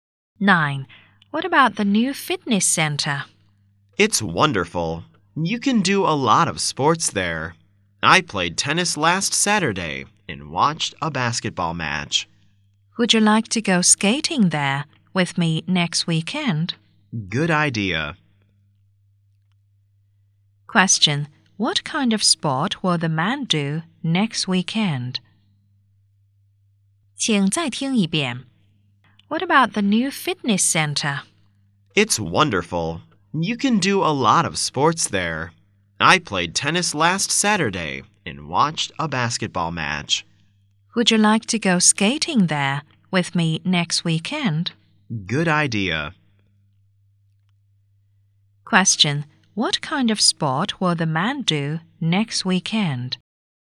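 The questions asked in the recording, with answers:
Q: Question, what kind of sport will the man do next weekend?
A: Skating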